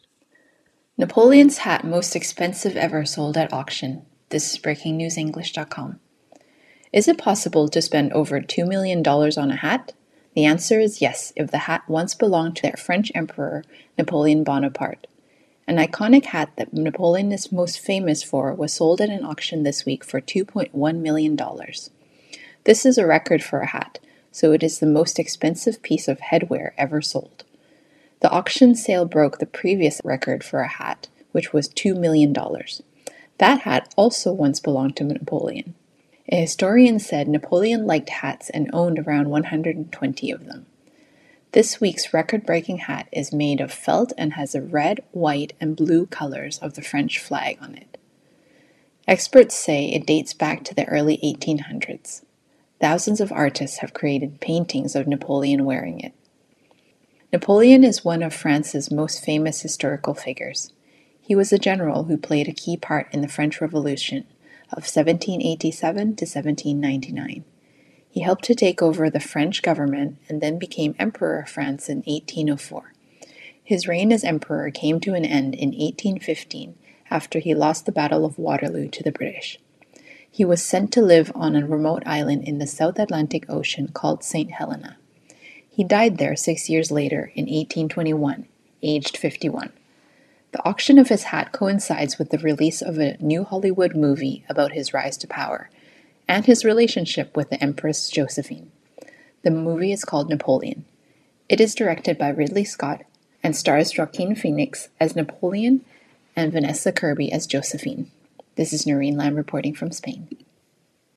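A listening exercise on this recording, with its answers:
True / False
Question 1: A hat worn by Napoleon Bonaparte sold for $2.5 million.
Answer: F

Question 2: The previous record for a hat was one worn by Julius Caesar.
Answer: F

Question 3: The hat that was sold comes from the beginning of the 19th century.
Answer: T

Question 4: The article says thousands of artists have painted Napoleon with his hat.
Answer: T

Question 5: Napoleon Bonaparte became the French emperor in 1815.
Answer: F

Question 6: Bonaparte was sent by the British to live on a South Pacific island.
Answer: F

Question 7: Bonaparte died at the age of 51.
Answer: T

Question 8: A movie about Napoleon is directed by Joaquin Phoenix.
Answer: F

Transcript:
Napoleon's hat most expensive ever sold at auction
Is it possible to spend over $2 million on a hat? The answer is "yes" if the hat once belonged to the French emperor Napoleon Bonaparte. 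An iconic hat that Napoleon is famous for was sold at an auction this week for $2.1 million. This is a record for a hat, so it is the most expensive piece of headwear ever sold. The auction sale broke the previous record for a hat, which was $2 million. That hat also once belonged to Napoleon. A historian said Napoleon liked hats and owned around 120 of them. This week's record-breaking hat is made of felt and has the red, white and blue colours of the French flag on it. Experts say it dates back to the early 1800s. Thousands of artists have created paintings of Napoleon wearing it.
Napoleon is one of France's most famous historical figures. He was a general who played a key part in the French Revolution of 1787-1799. He helped to take over the French government, and then became emperor of France in 1804. His reign as emperor came to an end in 1815 after he lost the Battle of Waterloo to the British. 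He was sent to live on a remote island in the South Atlantic Ocean called St. Helena. He died there six years later in 1821, aged 51. The auction of his hat coincides with the release of a new Hollywood movie about his rise to power, and his relationship with the empress Josephine. The movie is called "Napoleon". It is directed by Ridley Scott and stars Joaquin Phoenix as Napoleon and Vanessa Kirby as Josephine.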